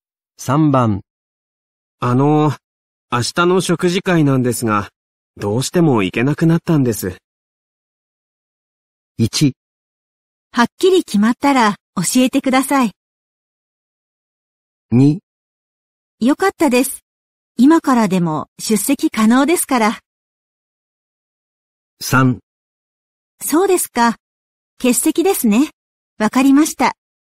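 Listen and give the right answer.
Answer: 3: そうですか。欠席ですね。わかりました。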